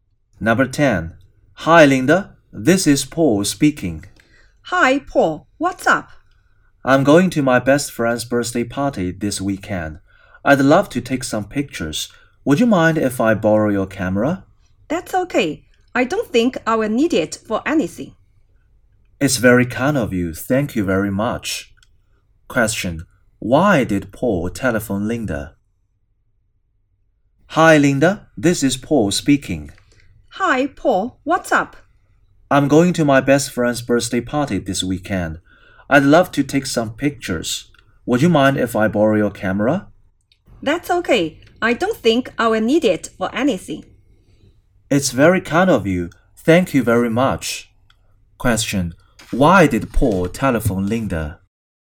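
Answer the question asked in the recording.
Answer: To borrow her camera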